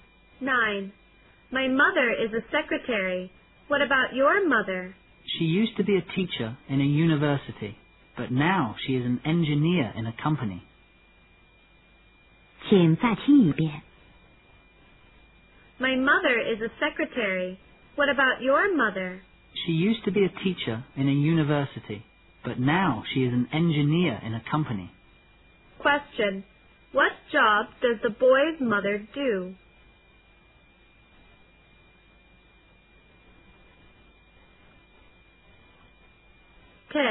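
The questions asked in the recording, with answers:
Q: What job does the boy's mother do?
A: An engineer in a company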